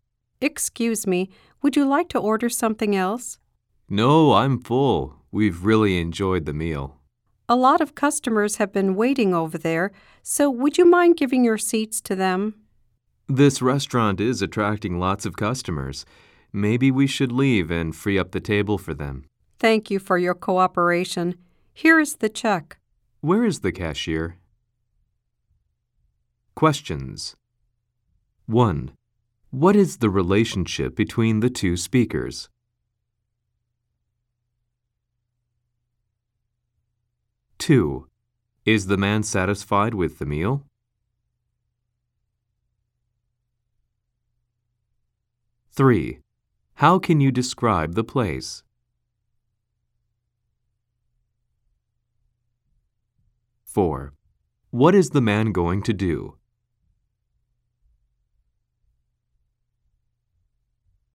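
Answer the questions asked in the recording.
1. Waiter and customer
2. Yes, he really enjoyed it
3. A busy, popular restaurant with lots of customers
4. Pay the check and leave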